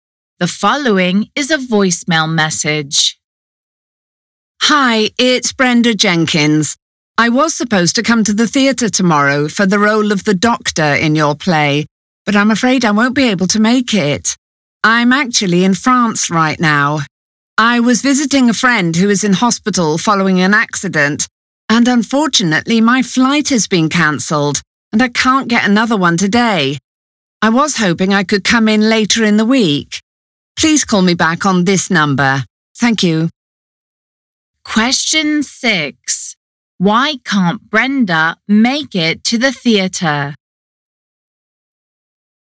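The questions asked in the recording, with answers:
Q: Why can't Brenda make it to the theatre?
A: Her flight from France was cancelled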